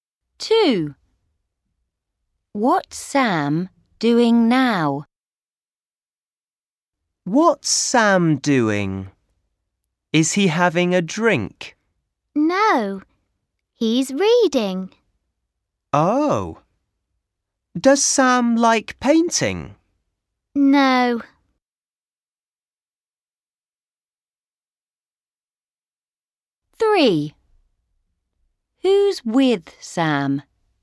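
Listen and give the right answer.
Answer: Reading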